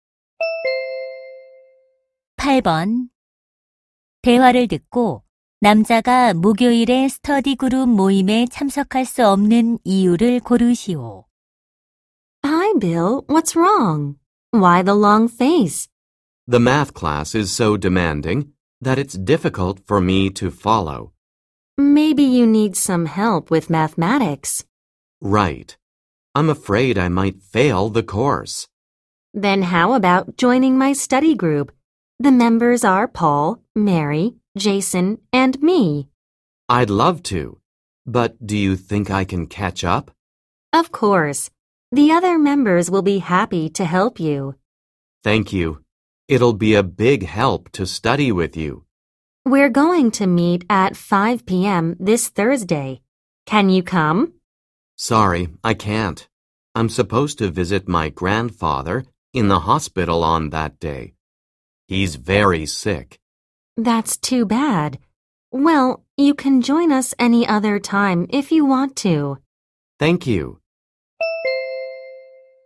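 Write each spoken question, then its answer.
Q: 대화를 듣고 남자가 목요일에 스터디 그룹 모임에 참석할 수 없는 이유를 고르시오.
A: 병원에 계신 할아버지를 찾아뵈어야 해서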